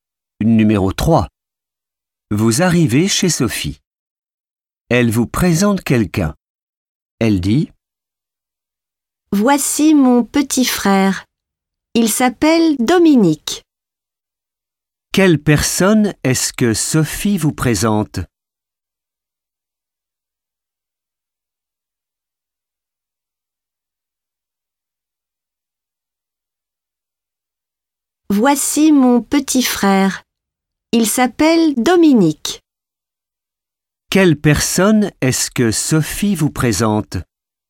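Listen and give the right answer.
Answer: son petit frère, Dominique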